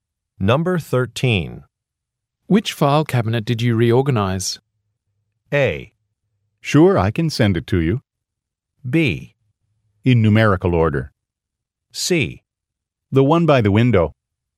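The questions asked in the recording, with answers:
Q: Which file cabinet did you reorganize?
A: C: The one by the window.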